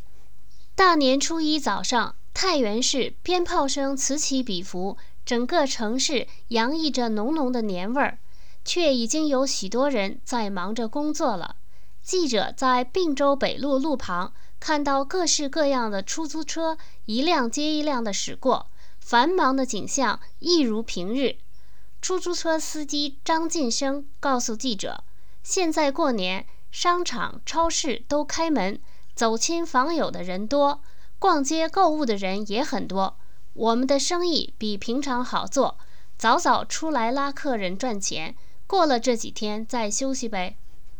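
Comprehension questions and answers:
Please answer the following questions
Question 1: 为什么过年时出租车的生意比平常好?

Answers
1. 因为商场超市都开门,走亲访友和逛街购物的人很多

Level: 3rd Year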